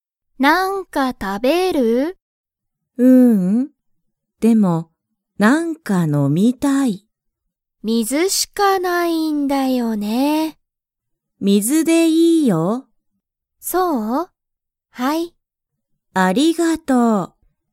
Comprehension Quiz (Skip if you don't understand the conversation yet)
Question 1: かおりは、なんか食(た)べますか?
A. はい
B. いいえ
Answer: B. いいえ

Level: Level 1

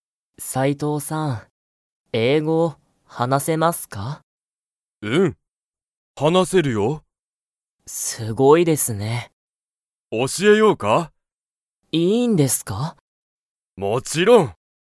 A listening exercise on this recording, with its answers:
斉藤さいとうさんは、英語えいごが話はなせますか?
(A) はい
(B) いいえ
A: (A) はい

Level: Level 1

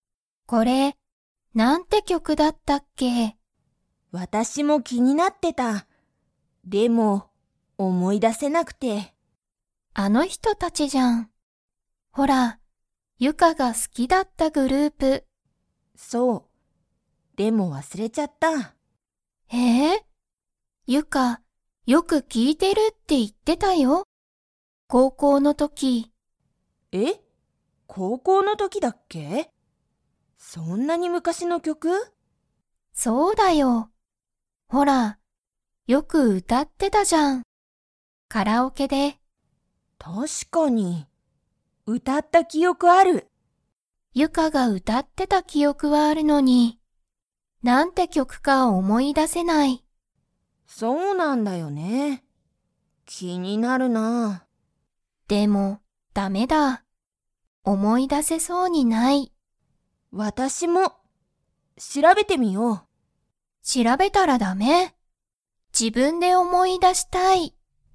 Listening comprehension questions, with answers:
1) ユカは、 の時ときよくこの曲きょくを聴きいてた。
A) 仕事しごと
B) ご飯はん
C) グループ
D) 高校こうこう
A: D) 高校こうこう

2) 二人ふたりは、これがなんて曲きょくか思おもい出だせましたか?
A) はい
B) いいえ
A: B) いいえ

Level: Level 3

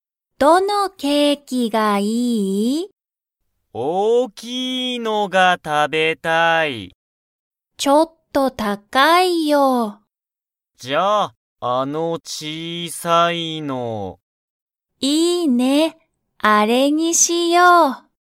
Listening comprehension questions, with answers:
ヨウコとマサキは、大(おお)きいケーキにしますか?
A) はい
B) いいえ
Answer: B) いいえ

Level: Level 1

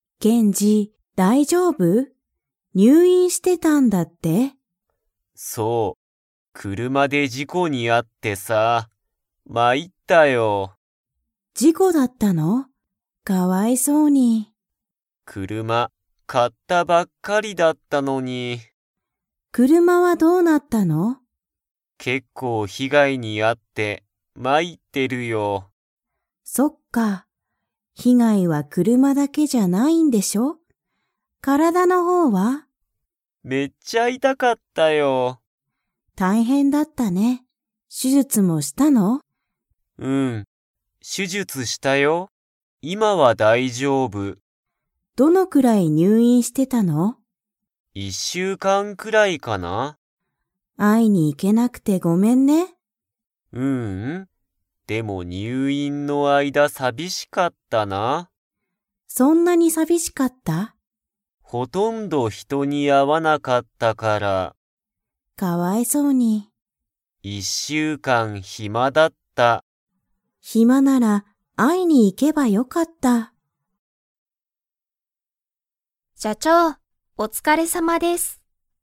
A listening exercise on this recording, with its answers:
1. ケンジは、どのくらい入院にゅういんしていましたか?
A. 一日いちにち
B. 三日みっか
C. 一週間いっしゅうかん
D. 二週間にしゅうかん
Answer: C. 一週間いっしゅうかん

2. ケンジは、入院にゅういんの間あいだ人ひとに 。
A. たくさん会あった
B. ほとんど会あわなかった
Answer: B. ほとんど会あわなかった

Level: Level 4

